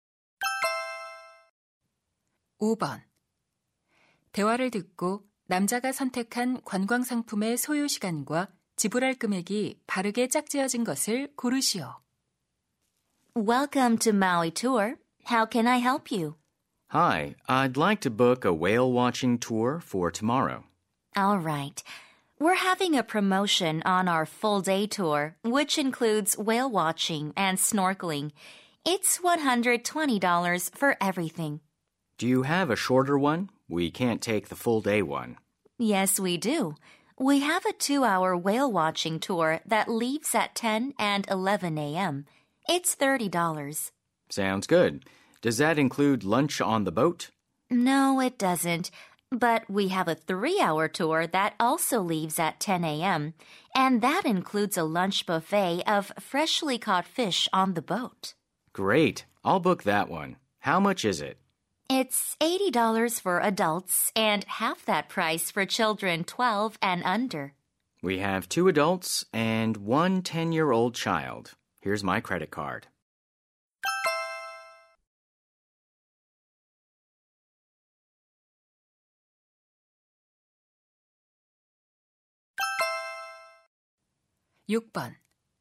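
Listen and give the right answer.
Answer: 3시간, $200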